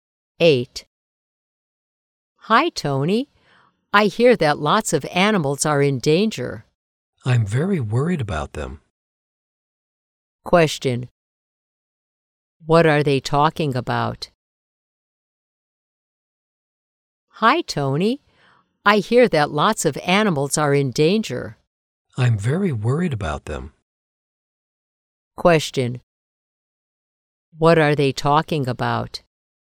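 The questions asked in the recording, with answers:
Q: What are they talking about?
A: Animals in danger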